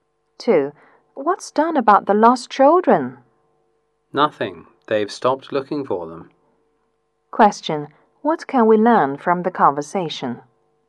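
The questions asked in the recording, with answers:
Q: What can we learn from the conversation?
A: They have stopped looking for the lost children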